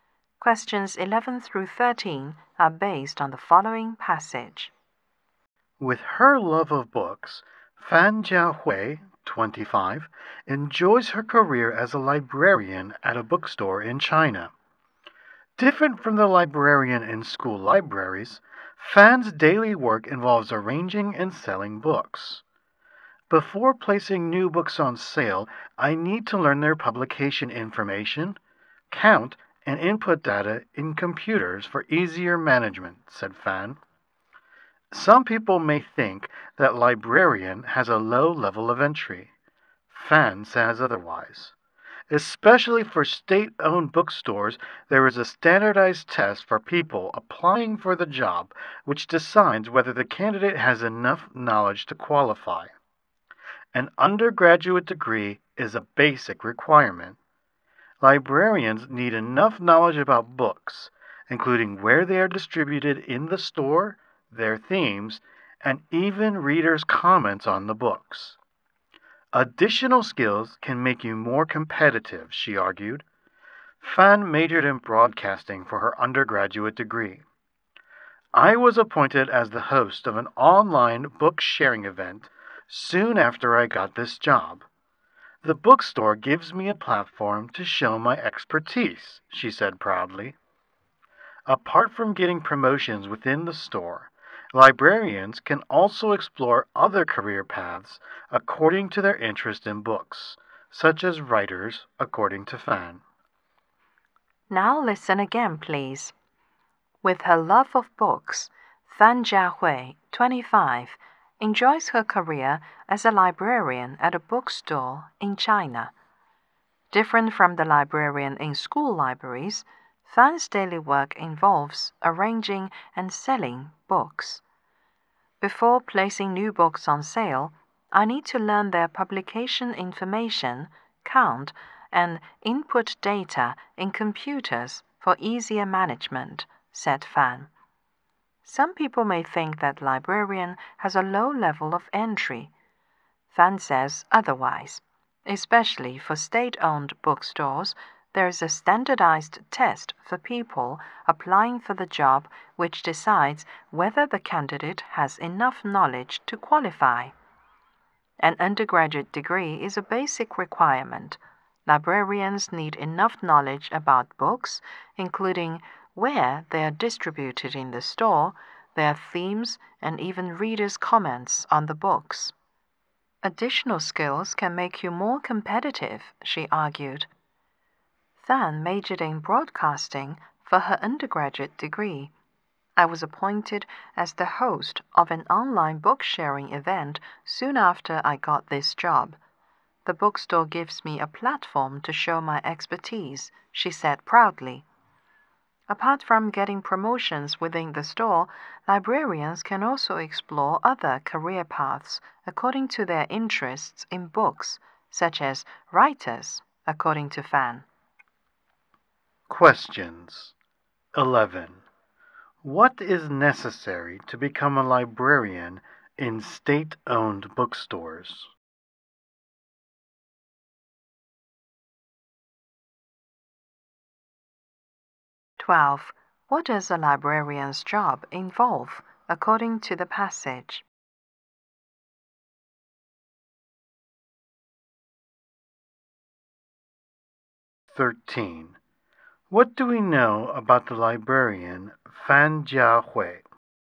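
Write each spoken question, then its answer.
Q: What is necessary to become a librarian in state-owned bookstores?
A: Passing a standardized test (and an undergraduate degree)

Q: What does a librarian's job involve according to the passage?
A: Arranging and selling books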